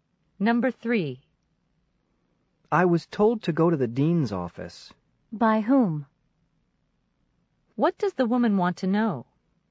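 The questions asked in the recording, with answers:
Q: What does the woman want to know?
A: Who told the man to go to the dean's office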